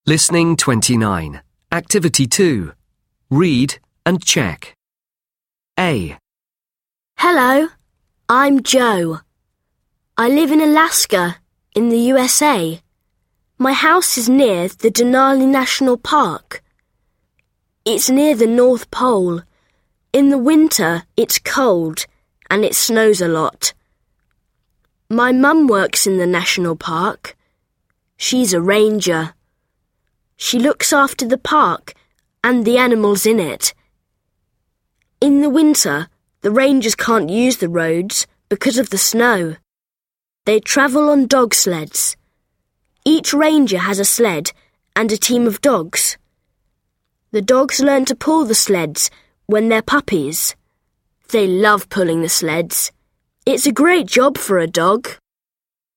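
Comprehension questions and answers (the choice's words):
CHOOSE THE CORRECT ANSWER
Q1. Where does Joe live?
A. He lives in New York in the USA.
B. He lives in Madrid in Spain.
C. He lives in the North Pole.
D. He lives in Alaska in the USA.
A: He lives in Alaska in the USA.

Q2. What's the weather like in winter?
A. It's hot and sunny.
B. It's warm and it rains a lot.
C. It's cold and it snows a lot.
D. It's cold and windy.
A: It's cold and it snows a lot.

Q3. Who is a ranger?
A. His dad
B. His sister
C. His friend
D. His mum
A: His mum

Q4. How do the rangers travel?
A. They travel on dog sleds.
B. They travel by car.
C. They tavel on foot.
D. They travel on horse sleds.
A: They travel on dog sleds.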